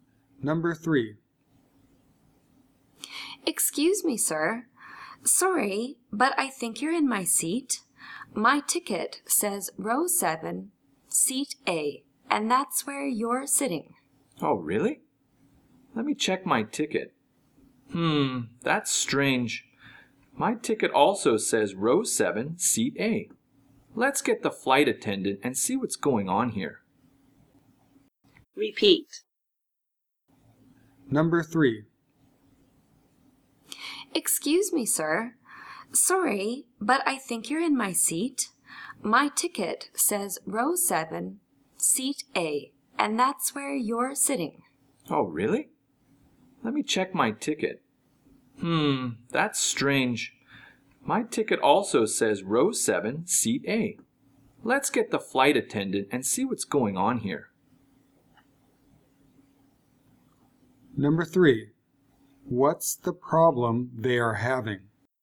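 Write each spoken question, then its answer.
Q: What's the problem they are having?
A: They both have tickets for the same seat, row 7, seat A.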